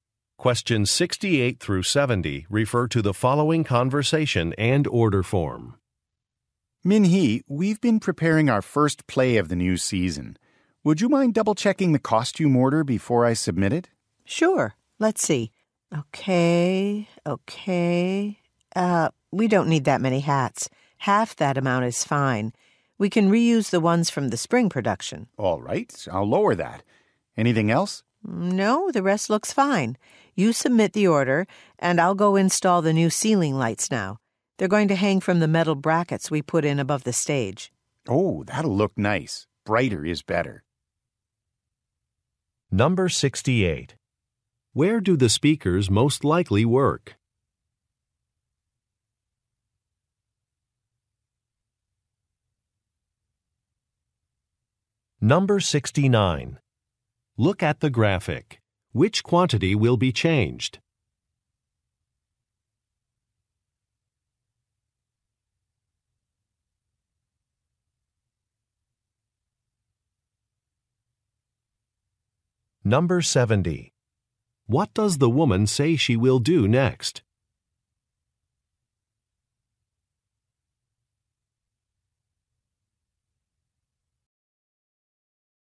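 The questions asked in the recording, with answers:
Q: Where do the speakers most likely work?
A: At a theater

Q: What does the woman say she will do next?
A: Install the new ceiling lights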